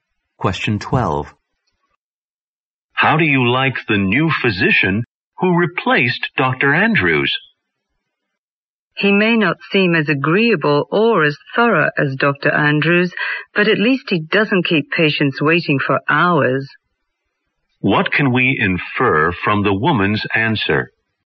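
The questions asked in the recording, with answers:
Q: What can we infer from the woman's answer?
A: The new doctor doesn't keep patients waiting long, though he may be less agreeable or thorough than Dr. Andrews.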